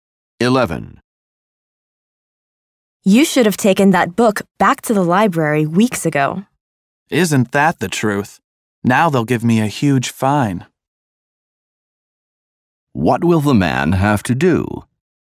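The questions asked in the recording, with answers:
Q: What will the man have to do?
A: Pay a large library fine.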